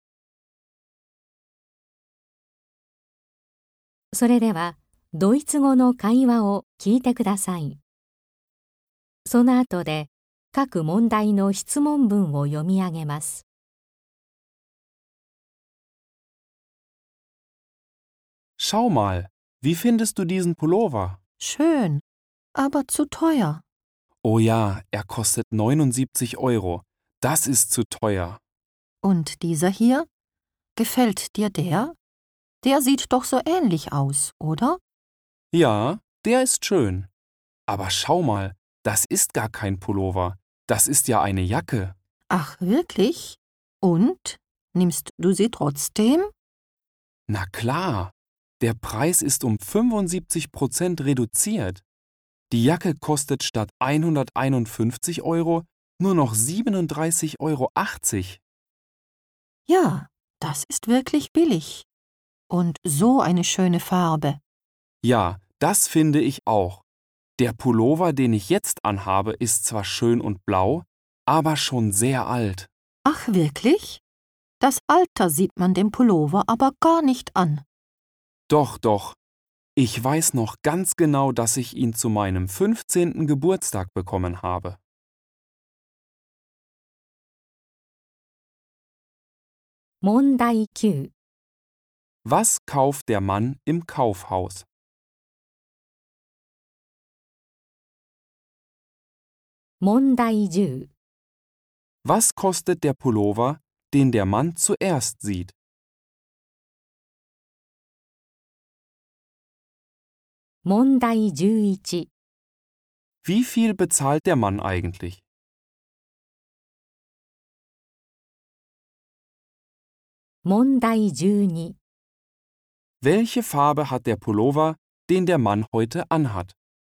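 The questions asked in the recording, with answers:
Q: Was kauft der Mann im Kaufhaus?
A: Eine Jacke

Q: Was kostet der Pullover, den der Mann zuerst sieht?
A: 79 Euro

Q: Wie viel bezahlt der Mann eigentlich?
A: 37,80 Euro

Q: Welche Farbe hat der Pullover, den der Mann heute anhat?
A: Blau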